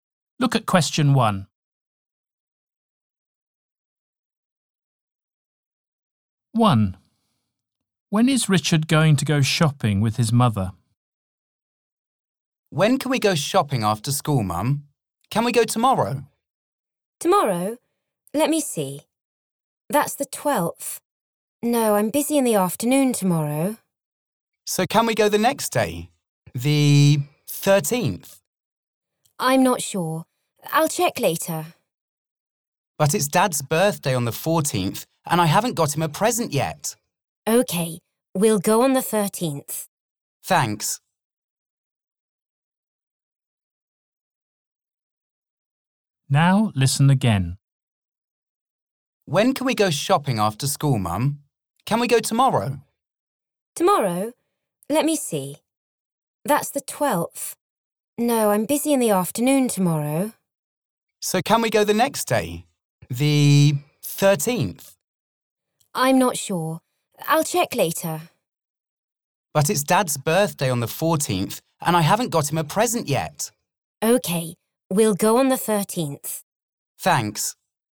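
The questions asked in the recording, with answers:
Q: When is Richard going to go shopping with his mother?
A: On the 13th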